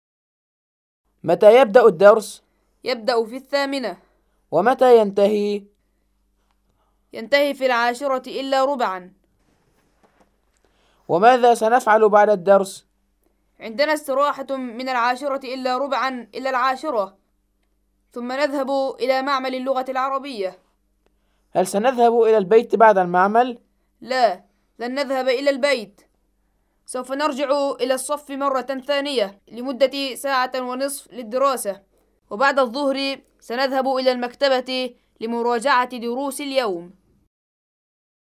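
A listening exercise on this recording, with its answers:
استمع للنص وأجب عن الأسئلة الآتية بـ () أو (x): (5 درجات)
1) يبدأ الدرس في الساعة التاسعة ( )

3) يذهب أحمد إلى المطعم بعد المختبر ( )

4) الاستراحة نصف ساعة. ( )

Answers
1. x
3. x
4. x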